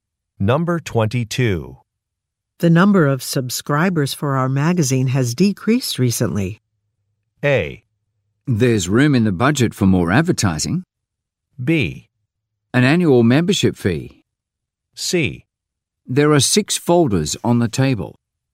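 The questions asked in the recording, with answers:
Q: The number of subscribers for our magazine has decreased recently.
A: A: There's room in the budget for more advertising.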